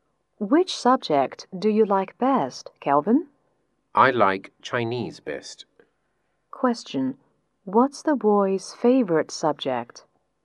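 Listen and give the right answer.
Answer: Chinese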